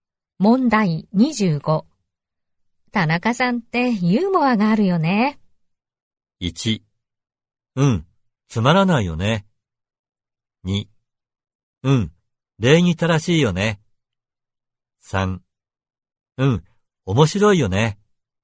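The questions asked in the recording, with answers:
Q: 田中さんってユーモアがあるよね。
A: 3: うん、面白いよね。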